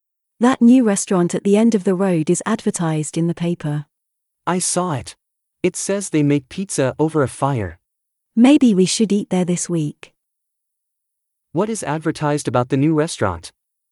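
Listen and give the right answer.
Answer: They make pizza over a fire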